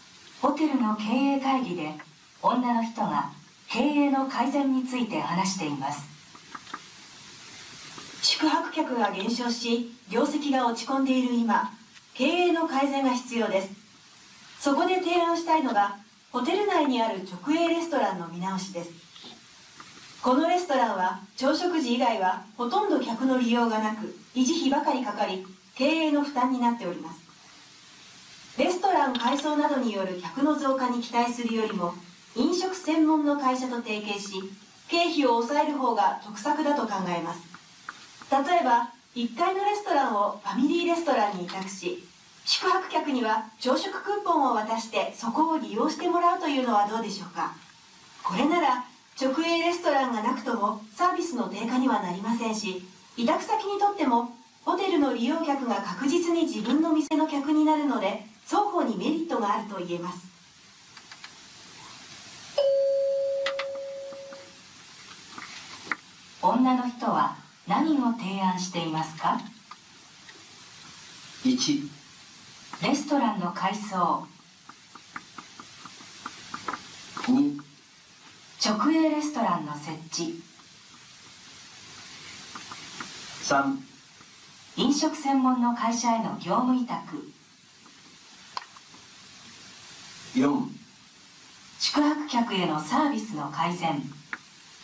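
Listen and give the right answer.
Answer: 3: 飲食専門の会社への業務委託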